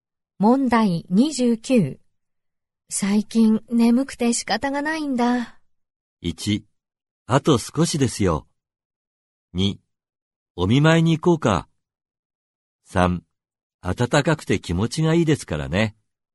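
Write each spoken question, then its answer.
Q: 最近眠くて仕方がないんだ。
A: 3: 暖かくて気持ちがいいですからね。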